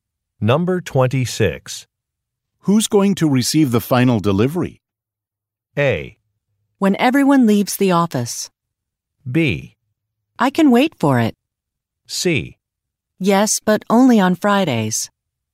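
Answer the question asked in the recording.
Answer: B: I can wait for it.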